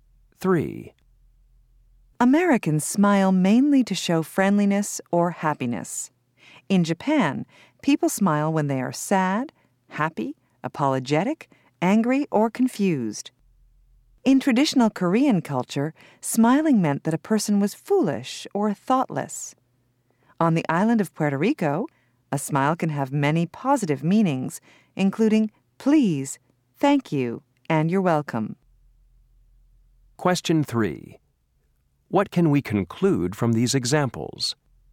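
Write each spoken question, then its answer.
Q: What can we conclude from these examples?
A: A smile can mean different things in different cultures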